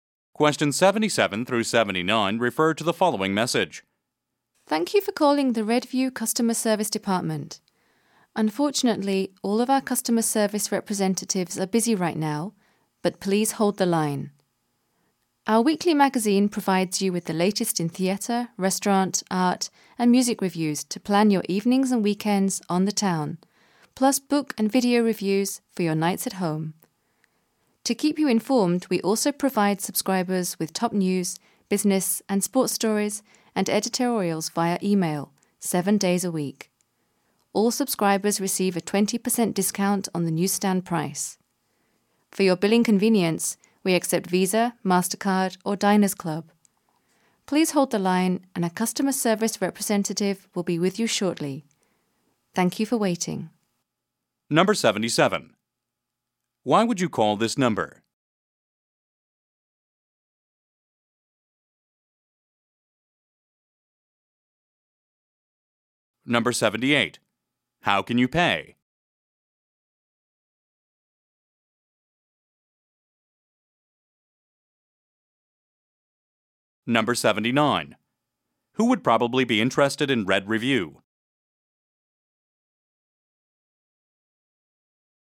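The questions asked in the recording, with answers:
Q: How can you pay?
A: By Visa, MasterCard or Diners Club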